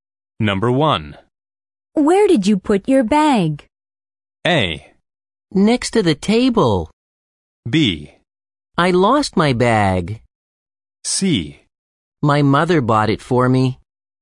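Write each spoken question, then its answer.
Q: Where did you put your bag?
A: A: Next to the table.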